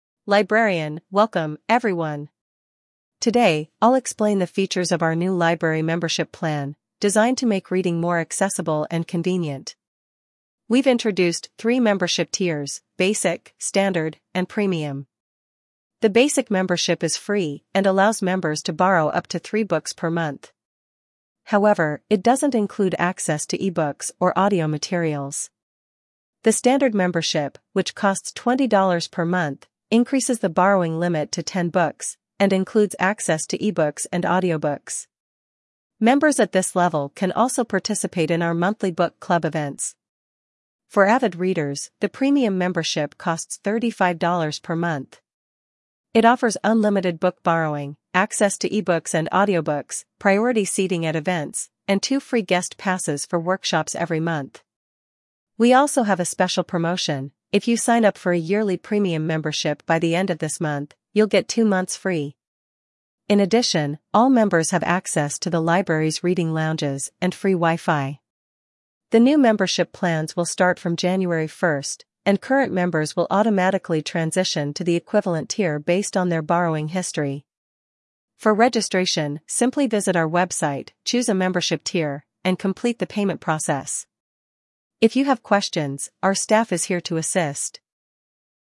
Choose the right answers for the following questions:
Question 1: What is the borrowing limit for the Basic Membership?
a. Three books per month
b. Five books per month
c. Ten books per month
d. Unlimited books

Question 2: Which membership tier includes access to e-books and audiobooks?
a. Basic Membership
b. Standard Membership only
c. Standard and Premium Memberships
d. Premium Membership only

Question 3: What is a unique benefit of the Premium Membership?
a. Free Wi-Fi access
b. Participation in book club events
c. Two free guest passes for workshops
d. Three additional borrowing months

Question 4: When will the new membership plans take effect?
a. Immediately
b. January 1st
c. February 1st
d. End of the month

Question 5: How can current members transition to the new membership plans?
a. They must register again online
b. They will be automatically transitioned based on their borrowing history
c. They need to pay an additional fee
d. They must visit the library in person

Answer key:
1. Three books per month
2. Standard and Premium Memberships
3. Two free guest passes for workshops
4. January 1st
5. They will be automatically transitioned based on their borrowing history

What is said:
Librarian: Welcome, everyone! Today, I'll explain the features of our new library membership plan, designed to make reading more accessible and convenient. We've introduced three membership tiers: Basic, Standard, and Premium.
The Basic Membership is free and allows members to borrow up to three books per month. However, it doesn't include access to e-books or audio materials.
The Standard Membership, which costs $20 per month, increases the borrowing limit to 10 books, and includes access to e-books and audiobooks. Members at this level can also participate in our monthly book club events.
For avid readers, the Premium Membership costs $35 per month. It offers unlimited book borrowing, access to e-books and audiobooks, priority seating at events, and two free guest passes for workshops every month.
We also have a special promotion: If you sign up for a yearly Premium Membership by the end of this month, you'll get two months free!
In addition, all members have access to the library's reading lounges and free Wi-Fi. The new membership plans will start from January 1st, and current members will automatically transition to the equivalent tier based on their borrowing history.
For registration, simply visit our website, choose a membership tier, and complete the payment process. If you have questions, our staff is here to assist.

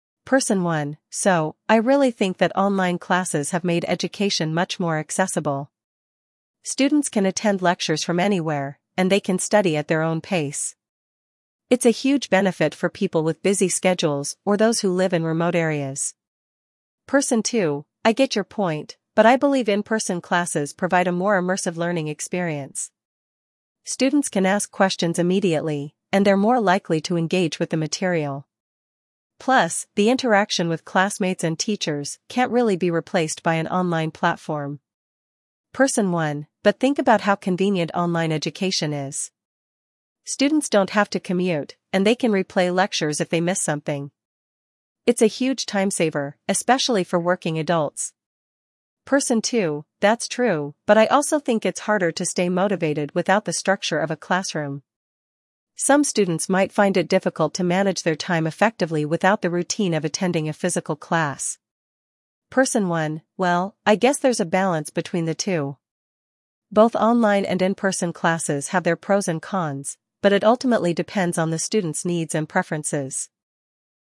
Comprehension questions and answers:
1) What advantage does Person 1 highlight about online classes?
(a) More interaction with classmates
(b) More engagement with teachers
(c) Convenience and flexibility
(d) Better learning outcomes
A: Convenience and flexibility

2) What does Person 2 argue about in-person classes?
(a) They are more convenient than online classes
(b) They provide a more immersive learning experience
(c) They are cheaper than online classes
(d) They are more accessible for working adults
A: They provide a more immersive learning experience

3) How does Person 1 view the impact of online education on students' schedules?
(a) It's more time-consuming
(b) It saves time, especially for working adults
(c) It's not flexible enough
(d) It's only useful for young students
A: It saves time, especially for working adults

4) What concern does Person 2 express about online classes?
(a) Students are more likely to skip classes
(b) Students may struggle with motivation and time management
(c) The technology is too expensive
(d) The content is less engaging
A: Students may struggle with motivation and time management

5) What do both participants agree on?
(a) Online classes are better than in-person ones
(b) In-person classes are outdated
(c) There are pros and cons to both online and in-person classes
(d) Online classes are only suitable for a certain age group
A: There are pros and cons to both online and in-person classes

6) What does Person 1 suggest as a solution to the debate?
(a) Choosing online classes over in-person ones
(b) Attending a hybrid model of classes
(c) Using online platforms exclusively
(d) Finding a balance between online and in-person education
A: Finding a balance between online and in-person education

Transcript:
Person 1: "So, I really think that online classes have made education much more accessible. Students can attend lectures from anywhere, and they can study at their own pace. It's a huge benefit for people with busy schedules or those who live in remote areas."
Person 2: "I get your point, but I believe in-person classes provide a more immersive learning experience. Students can ask questions immediately, and they're more likely to engage with the material. Plus, the interaction with classmates and teachers can't really be replaced by an online platform."
Person 1: "But think about how convenient online education is. Students don't have to commute, and they can replay lectures if they miss something. It's a huge time-saver, especially for working adults."
Person 2: "That's true, but I also think it's harder to stay motivated without the structure of a classroom. Some students might find it difficult to manage their time effectively without the routine of attending a physical class."
Person 1: "Well, I guess there's a balance between the two. Both online and in-person classes have their pros and cons, but it ultimately depends on the student's needs and preferences."

